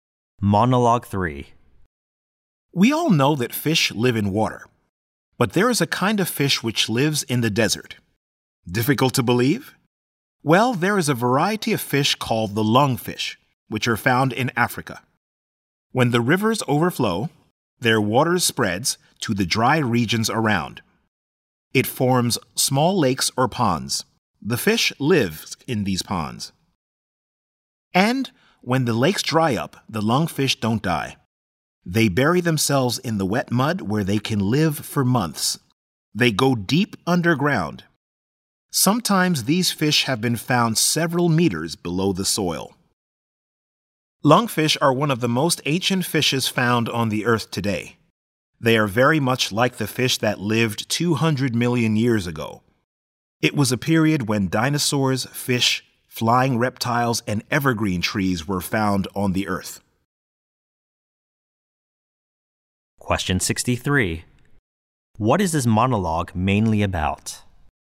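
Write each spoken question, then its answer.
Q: What is this monologue mainly about?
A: The lungfish, a fish that can survive in the desert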